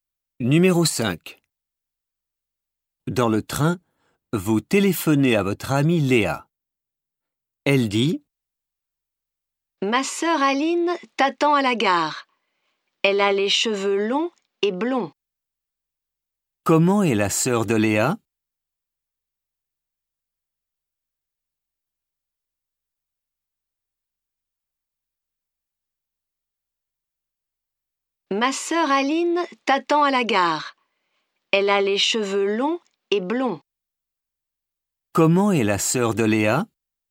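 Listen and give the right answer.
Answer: Elle a les cheveux longs et blonds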